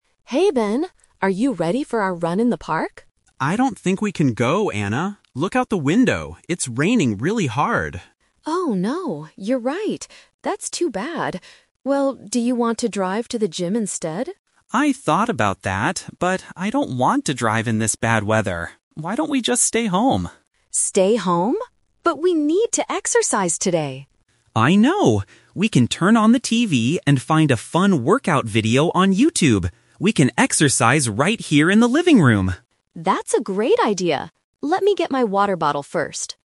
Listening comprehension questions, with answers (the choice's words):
Listen to the conversation between two friends. Choose the correct answer (A, B, or C) for each question.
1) What did Anna and Ben plan to do at first?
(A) Drive to the gym.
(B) Run in the park.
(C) Watch a movie on TV.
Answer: Run in the park.

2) What did Anna suggest doing when she saw the rain?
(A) Driving to the gym.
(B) Staying in the living room.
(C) Doing a YouTube workout.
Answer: Driving to the gym.

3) What are they going to do right now?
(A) Go running in the rain.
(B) Drive their car to the gym.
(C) Exercise at home with a video.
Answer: Exercise at home with a video.

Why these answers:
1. Anna asks at the beginning, "Are you ready for our run in the park?" This was their original plan. Trap A is wrong: Driving to the gym is Anna's second idea after she sees the rain, not the first plan. Trap C is wrong: They mention turning on the TV, but it is for a "workout video", not a movie.
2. When Anna sees the rain, she asks, "Well, do you want to drive to the gym instead?" Trap B is wrong: Ben is the one who suggests staying home ("Why don't we just stay home?"), not Anna. Trap C is wrong: Ben is also the one who suggests the YouTube workout.
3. Ben says they can "find a fun workout video on YouTube" and exercise in the living room. Anna agrees ("That's a great idea"). Trap A is wrong: They cannot go running because "It's raining really hard." Trap B is wrong (The Twist): Anna suggested the gym, but Ben rejected it because he doesn't "want to drive in this bad weather."

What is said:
Anna: Hey, Ben. Are you ready for our run in the park?
Ben: I don't think we can go, Anna. Look out the window. It's raining really hard.
Anna: Oh no, you're right. That's too bad. Well, do you want to drive to the gym instead?
Ben: I thought about that, but I don't want to drive in this bad weather. Why don't we just stay home?
Anna: Stay home? But we need to exercise today.
Ben: I know! We can turn on the TV and find a fun workout video on YouTube. We can exercise right here in the living room.